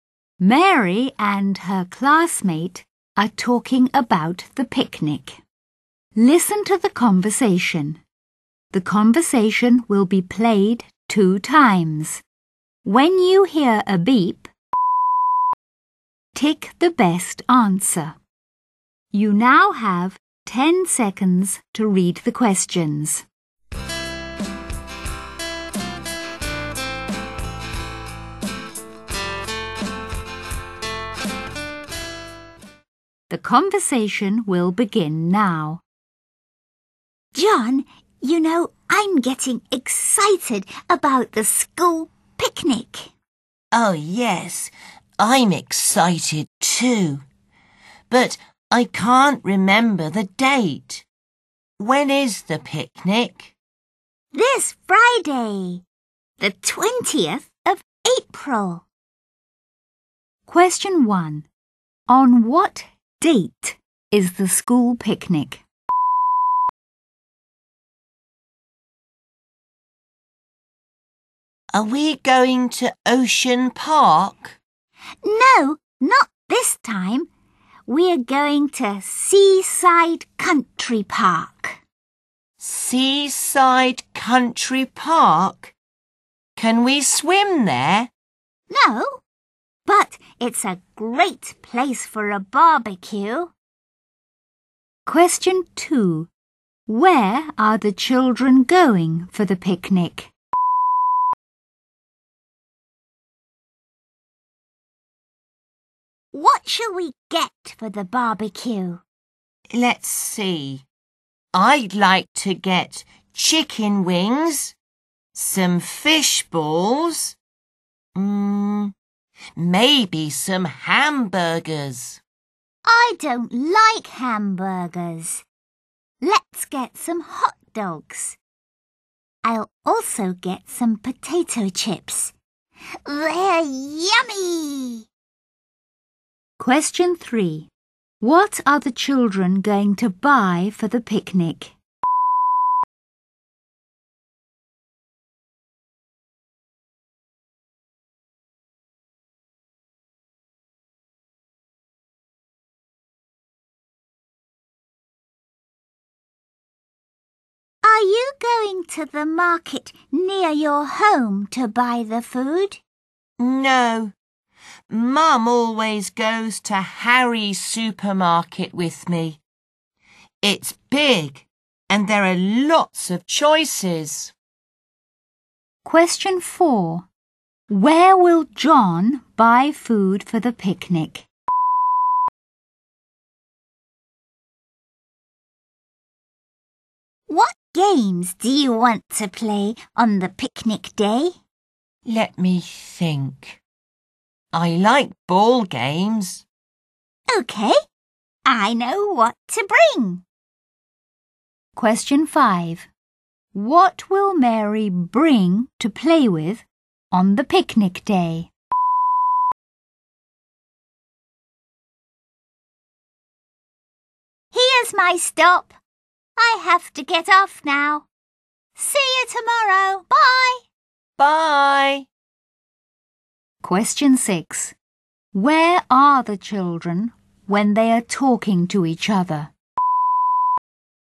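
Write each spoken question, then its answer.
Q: On what date is the school picnic?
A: This Friday, the 20th of April

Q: Where are the children going for the picnic?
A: Seaside Country Park

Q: Where will John buy food for the picnic?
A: Harry's supermarket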